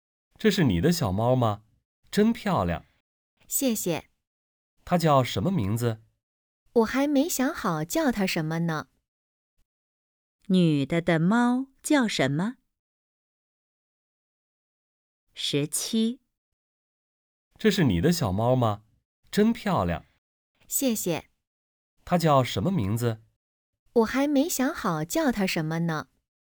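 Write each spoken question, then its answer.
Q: 女的的猫叫什么?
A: 还没有名字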